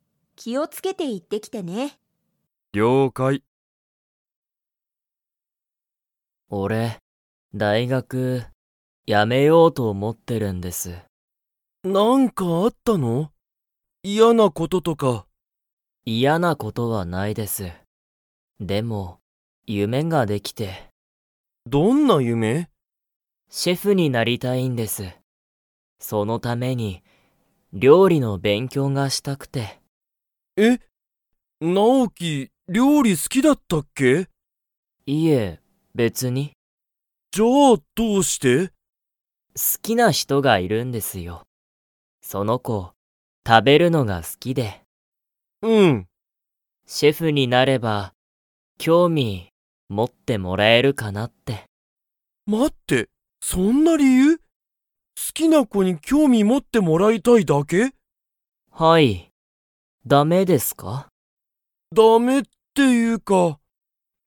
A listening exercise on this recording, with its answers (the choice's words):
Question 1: ナオキは何(なん)の勉強(べんきょう)をしたいですか?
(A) 大学(だいがく)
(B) 英語(えいご)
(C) 映画(えいが)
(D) 料理(りょうり)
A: 料理(りょうり)

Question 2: ナオキの好(す)きな人(ひと)は、食(た)べるのが 。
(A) 好(す)きだ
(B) 好(す)きじゃない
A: 好(す)きだ

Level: Level 3